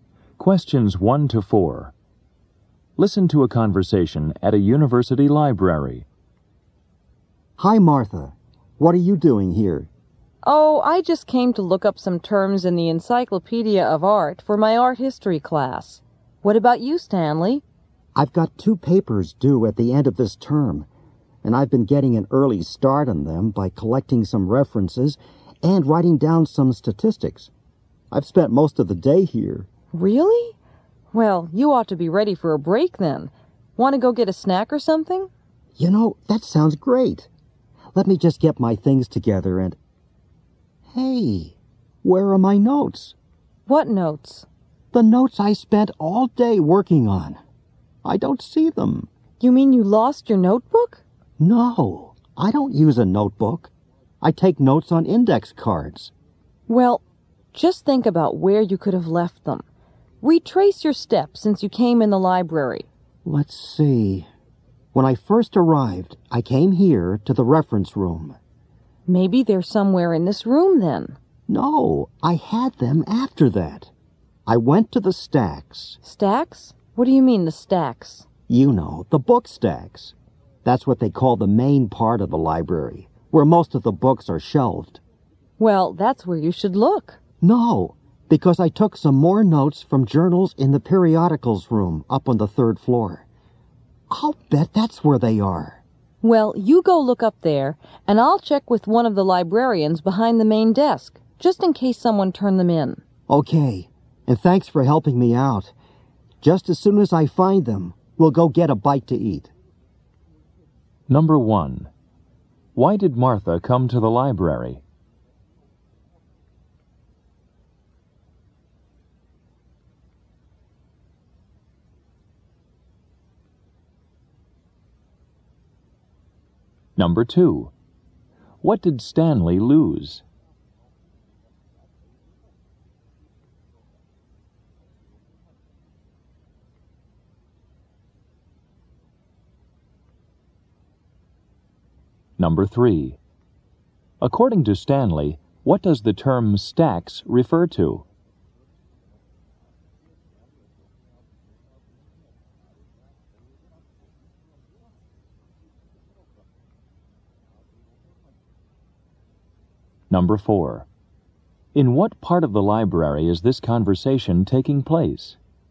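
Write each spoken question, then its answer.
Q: Why did Martha come to the library?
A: To look up some terms in the Encyclopedia of Art for her art history class.

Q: What did Stanley lose?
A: His notes on index cards.

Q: According to Stanley, what does the term stacks refer to?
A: The main part of the library, where most books are shelved.

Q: In what part of the library is this conversation taking place?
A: The reference room.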